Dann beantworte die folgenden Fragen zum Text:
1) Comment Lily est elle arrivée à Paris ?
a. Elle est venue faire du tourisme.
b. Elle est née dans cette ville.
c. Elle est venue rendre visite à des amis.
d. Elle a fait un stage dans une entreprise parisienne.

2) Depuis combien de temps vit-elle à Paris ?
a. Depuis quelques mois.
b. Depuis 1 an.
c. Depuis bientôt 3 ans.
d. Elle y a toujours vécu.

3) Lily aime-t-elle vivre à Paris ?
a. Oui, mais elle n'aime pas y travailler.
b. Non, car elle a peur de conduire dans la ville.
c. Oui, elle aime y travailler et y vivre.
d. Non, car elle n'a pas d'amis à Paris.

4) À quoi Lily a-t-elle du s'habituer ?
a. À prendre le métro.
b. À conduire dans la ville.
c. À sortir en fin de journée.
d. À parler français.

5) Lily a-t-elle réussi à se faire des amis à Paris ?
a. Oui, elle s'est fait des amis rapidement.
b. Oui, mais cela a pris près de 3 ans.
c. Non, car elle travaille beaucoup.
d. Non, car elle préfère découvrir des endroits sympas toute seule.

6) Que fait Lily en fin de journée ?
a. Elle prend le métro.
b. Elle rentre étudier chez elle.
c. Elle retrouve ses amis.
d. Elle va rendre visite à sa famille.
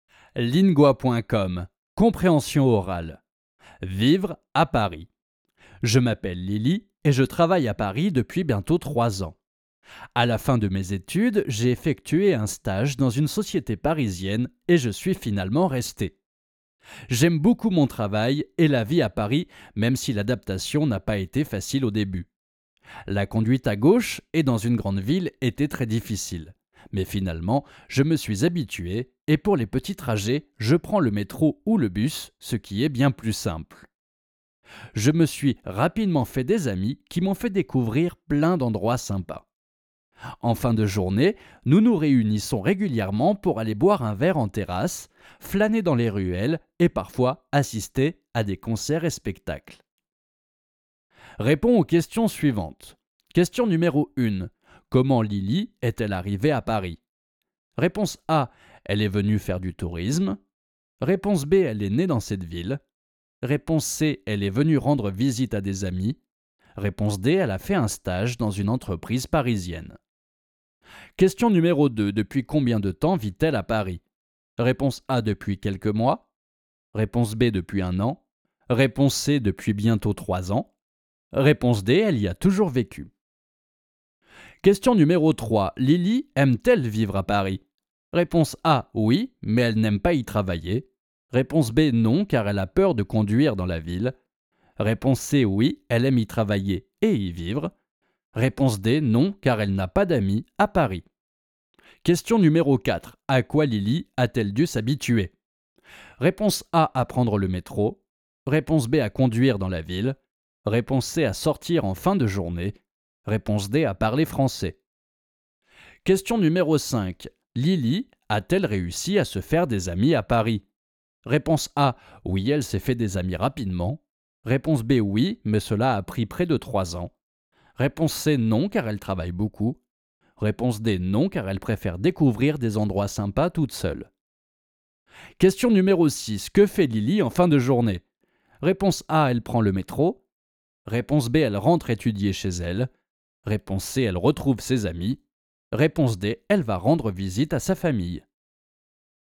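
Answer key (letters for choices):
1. d
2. c
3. c
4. b
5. a
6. c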